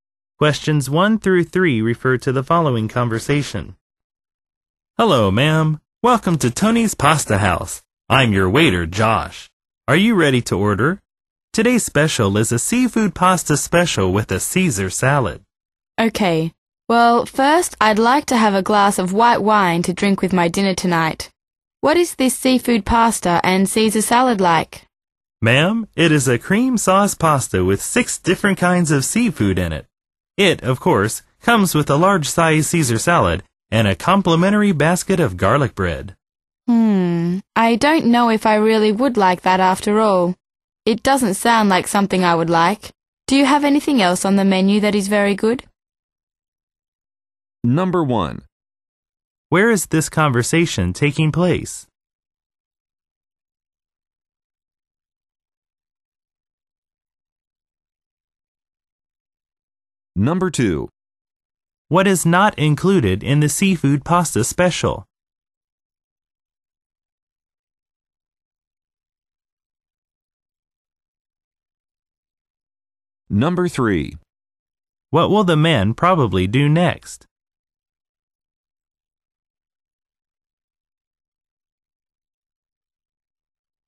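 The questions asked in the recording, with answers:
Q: Where is this conversation taking place?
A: At a restaurant (Tony's Pasta House)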